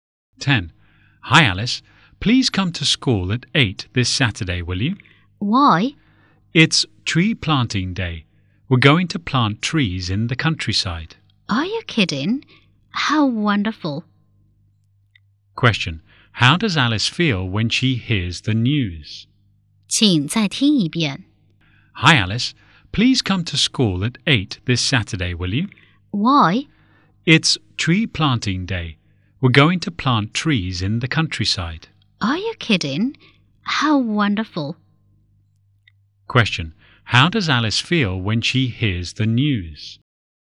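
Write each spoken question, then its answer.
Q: Question. How does Alice feel when she hears the news?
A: Excited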